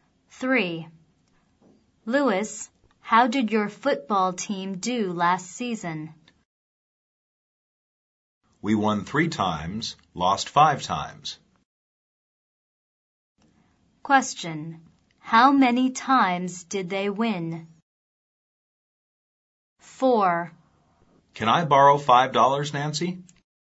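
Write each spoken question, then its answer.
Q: How many times did they win?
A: 3 times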